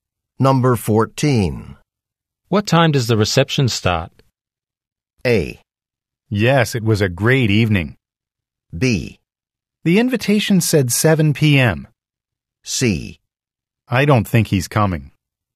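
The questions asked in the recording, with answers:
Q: What time does the reception start?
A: B: The invitation said 7 p.m.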